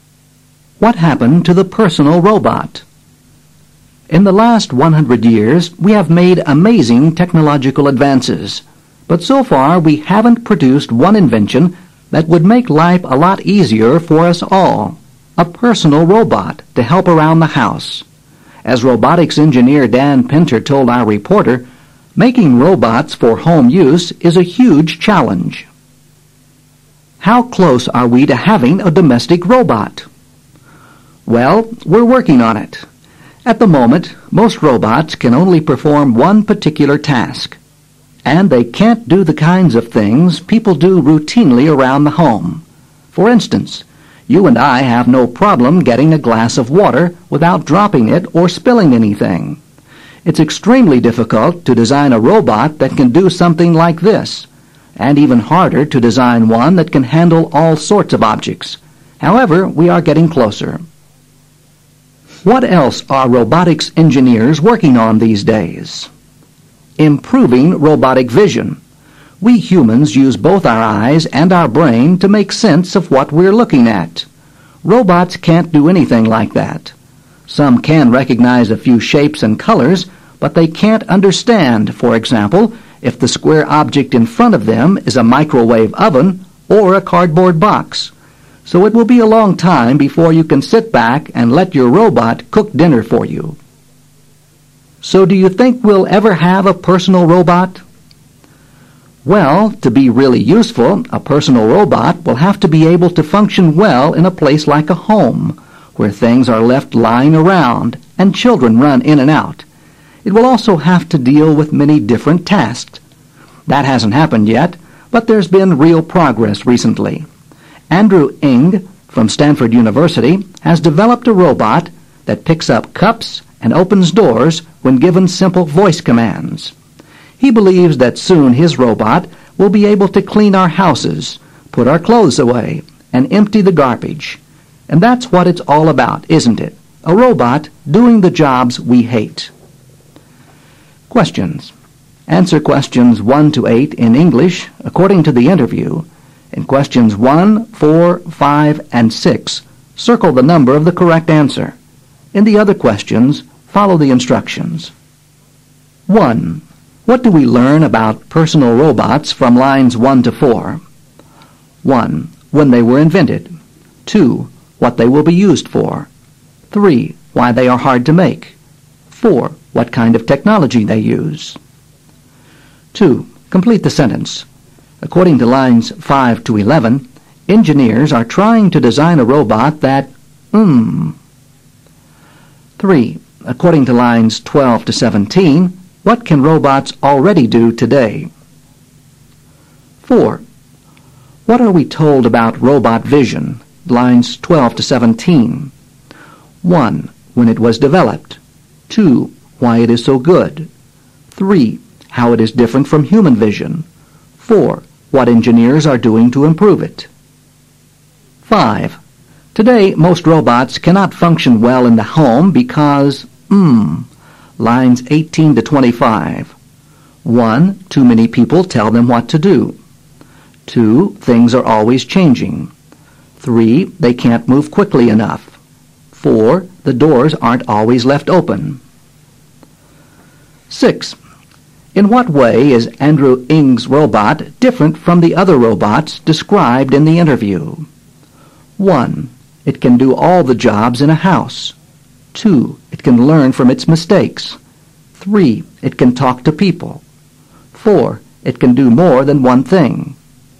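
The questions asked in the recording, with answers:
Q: What do we learn about personal robots from lines 1 to 4?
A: 3: Why they are hard to make.

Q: What are we told about robot vision, lines 12 to 17?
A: 3: How it is different from human vision.

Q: Today, most robots cannot function well in the home because, lines 18 to 25.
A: 2: Things are always changing.

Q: In what way is Andrew Ng's robot different from the other robots described in the interview?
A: 4: It can do more than one thing.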